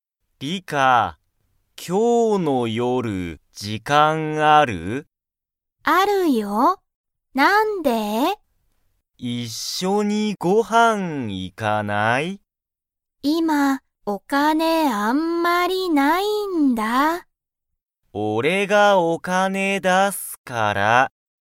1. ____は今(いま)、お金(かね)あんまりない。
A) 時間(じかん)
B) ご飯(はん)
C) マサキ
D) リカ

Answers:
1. D

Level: Level 1

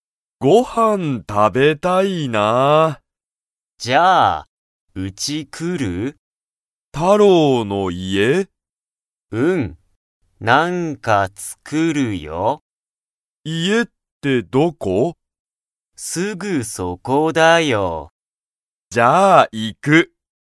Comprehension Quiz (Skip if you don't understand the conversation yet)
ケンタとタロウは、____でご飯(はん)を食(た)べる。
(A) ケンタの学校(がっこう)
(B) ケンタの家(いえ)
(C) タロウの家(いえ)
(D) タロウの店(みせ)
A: C

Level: Level 1

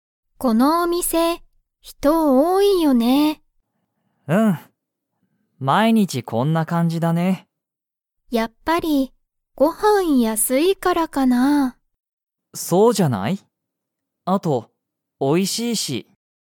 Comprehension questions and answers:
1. このお店みせは、ご飯はんが____。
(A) 多おおい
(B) 安やすい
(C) すごい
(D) 面白おもしろい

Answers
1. B

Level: Level 1

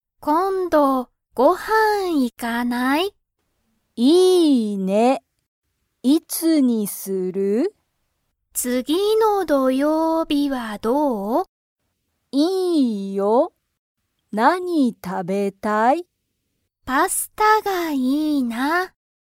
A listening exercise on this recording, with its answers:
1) ヒナとユイは、____、ご飯(はん)に行(い)く。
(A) 今(いま)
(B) 今日(きょう)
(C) 次(つぎ)の土曜日(どようび)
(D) 次(つぎ)の日曜日(にちようび)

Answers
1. C

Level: Level 1

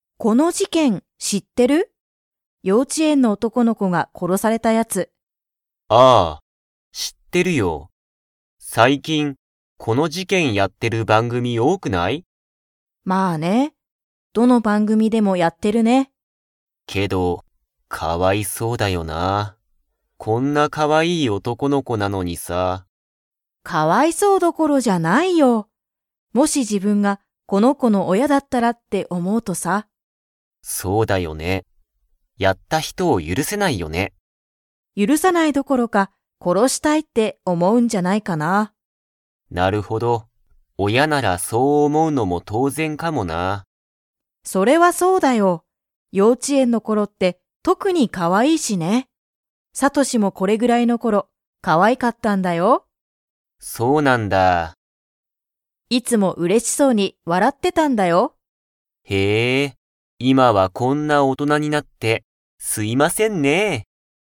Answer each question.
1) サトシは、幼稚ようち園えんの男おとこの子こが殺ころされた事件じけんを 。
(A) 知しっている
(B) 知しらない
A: A

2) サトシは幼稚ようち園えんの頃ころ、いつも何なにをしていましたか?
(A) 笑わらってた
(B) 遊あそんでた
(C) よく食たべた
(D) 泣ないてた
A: A

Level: Level 4

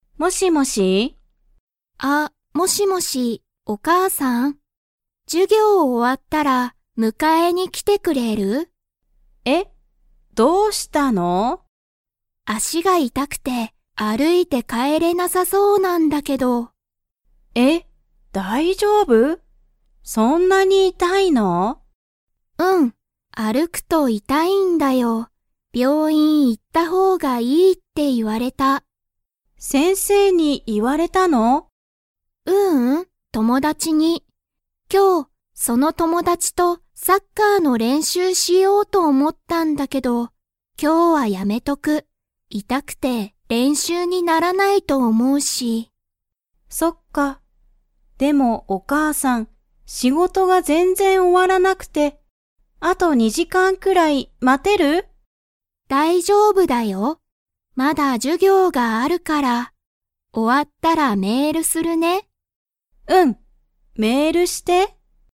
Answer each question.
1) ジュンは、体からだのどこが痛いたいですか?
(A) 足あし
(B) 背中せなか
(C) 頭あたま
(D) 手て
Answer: A

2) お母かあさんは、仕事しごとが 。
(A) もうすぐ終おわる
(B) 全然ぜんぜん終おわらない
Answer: B

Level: Level 3

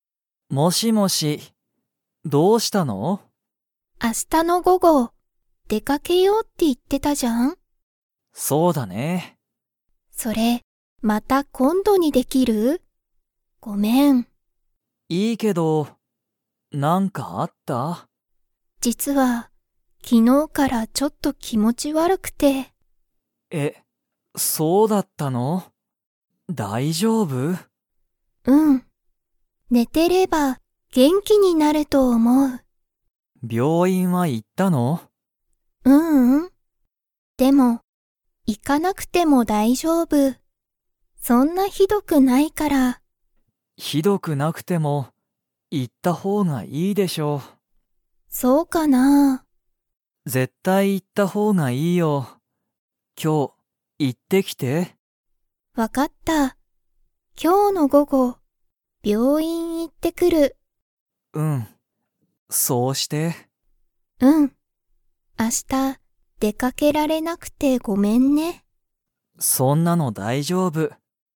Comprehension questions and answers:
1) ユリとカイトは、明日あした 。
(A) 出でかける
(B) 出でかけない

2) ユリは、今日きょうの午後ごごどこに行いきますか?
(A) 学校がっこう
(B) 会社かいしゃ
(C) 駅えき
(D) 病院びょういん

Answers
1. B
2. D

